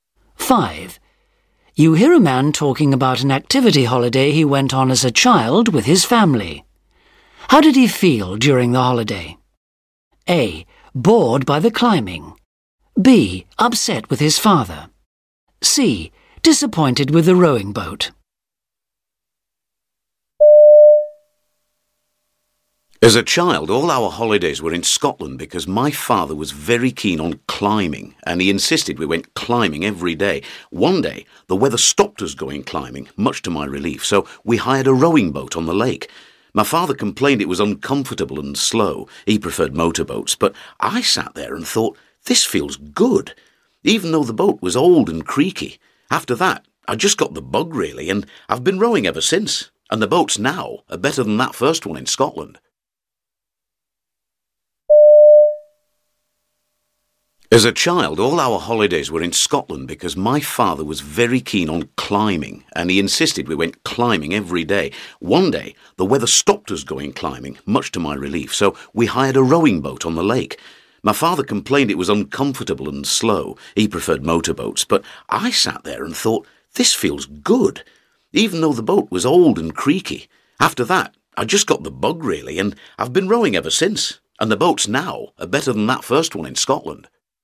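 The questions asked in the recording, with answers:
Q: How did he feel during the holiday?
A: A: Bored by the climbing.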